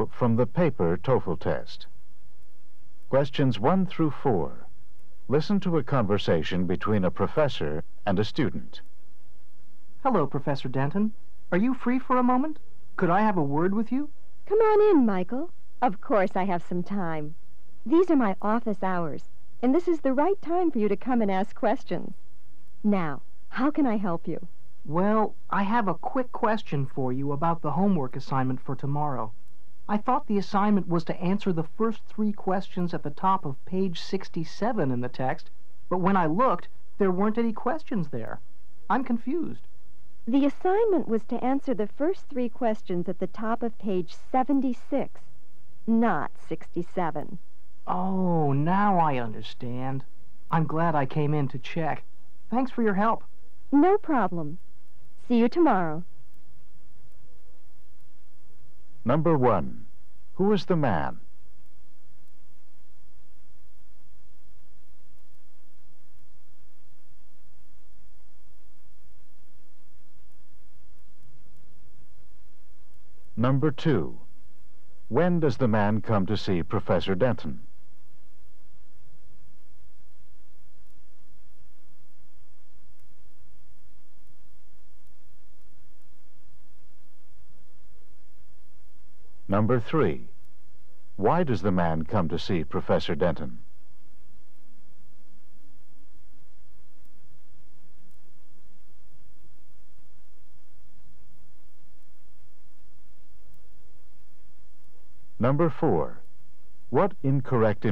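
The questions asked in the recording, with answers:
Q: Who is the man?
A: A student.

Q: When does the man come to see Professor Denton?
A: During office hours.

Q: Why does the man come to see Professor Denton?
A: To ask about the homework assignment.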